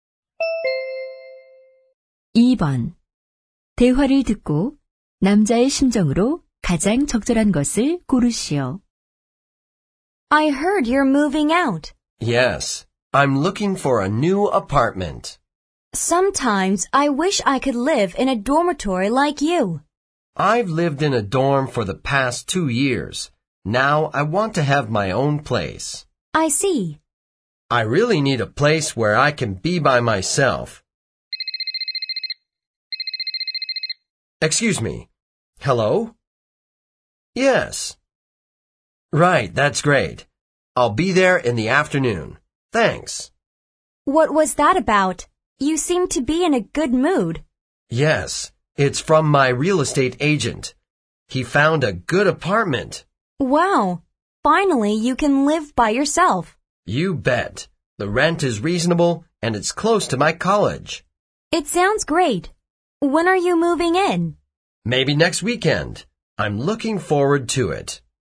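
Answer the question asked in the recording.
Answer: 기대에 차 있고 기쁨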